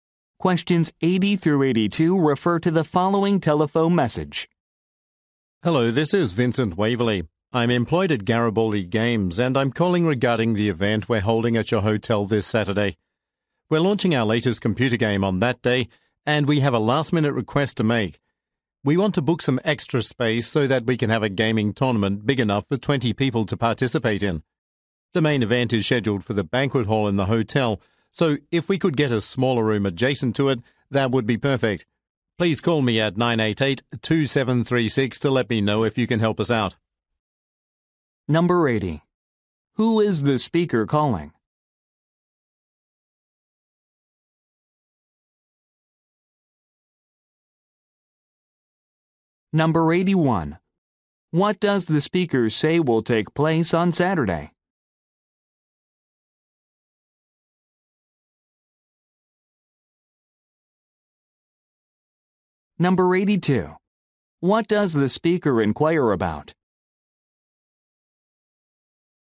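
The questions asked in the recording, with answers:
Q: Who is the speaker calling?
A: A hotel

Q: What does the speaker say will take place on Saturday?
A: The launch of a new computer game

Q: What does the speaker inquire about?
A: Booking an extra, smaller room next to the banquet hall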